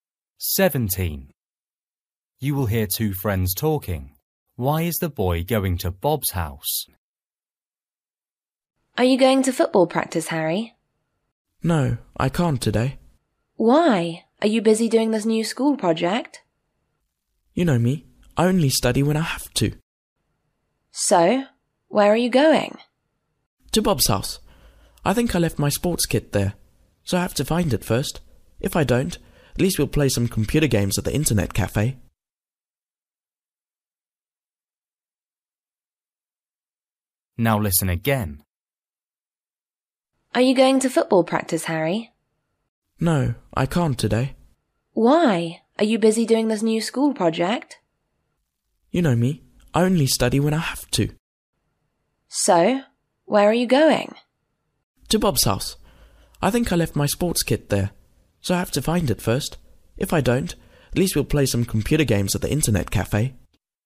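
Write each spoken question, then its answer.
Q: Why is the boy going to Bob's house?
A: To find his sports kit he left there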